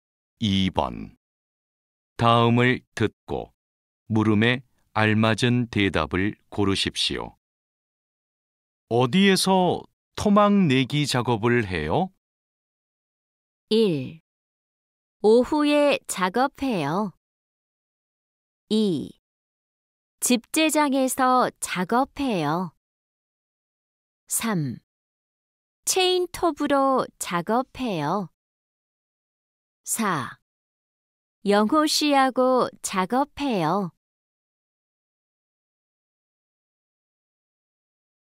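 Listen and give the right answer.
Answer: 2: 집재장에서 작업해요.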